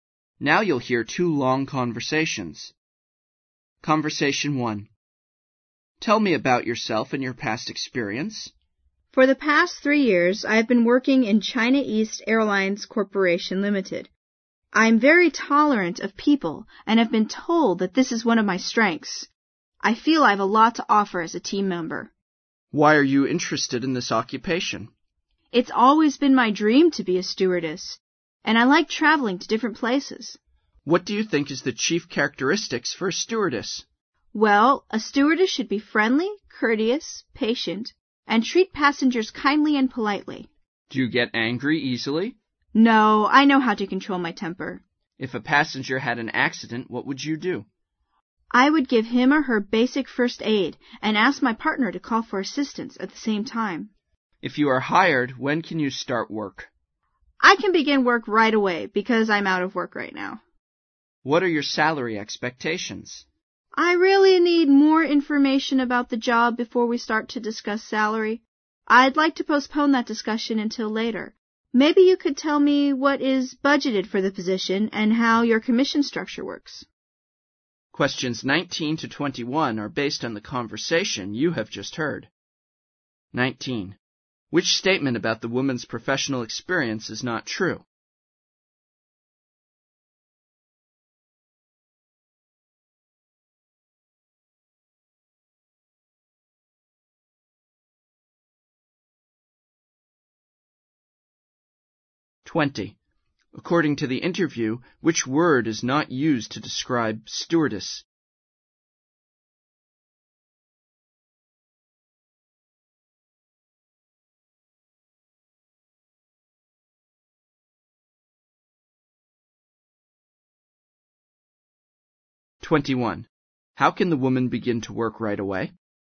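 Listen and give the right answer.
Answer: Because she is out of work right now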